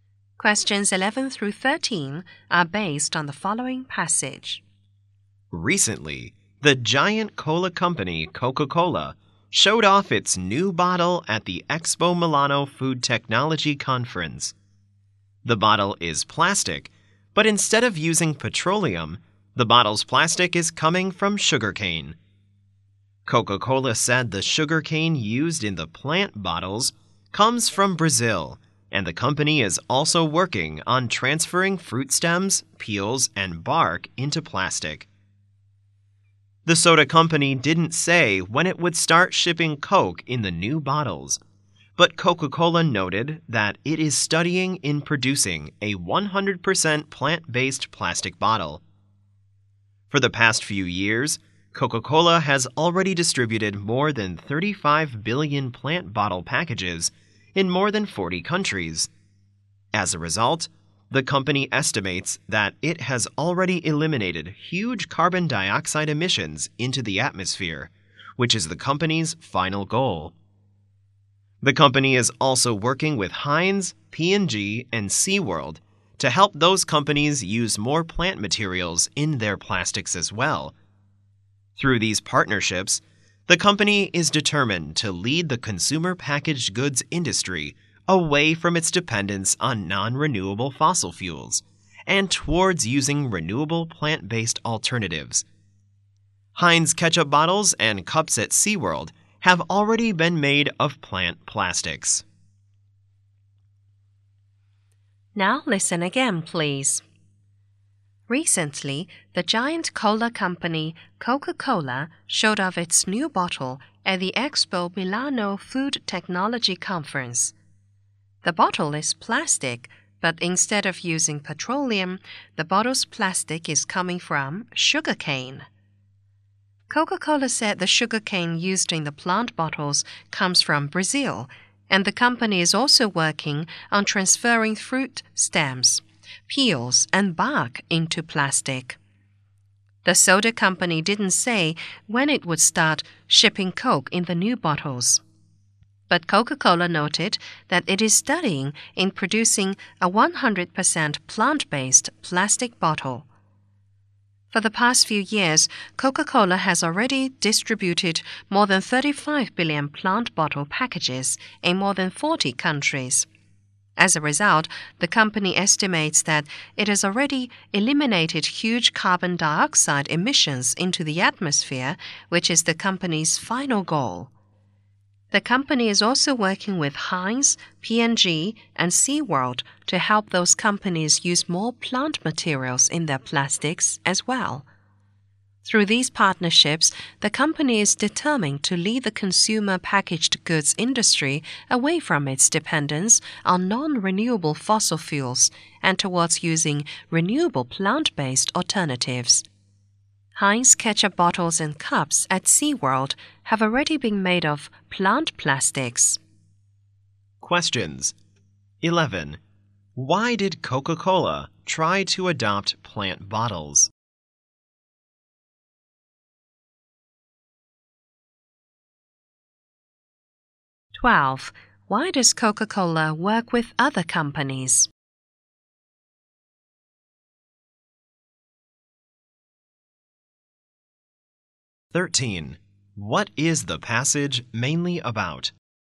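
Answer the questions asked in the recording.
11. To reduce carbon dioxide emissions
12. To help them use more plant materials and move away from fossil fuels
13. Coca-Cola's new plant-based plastic bottles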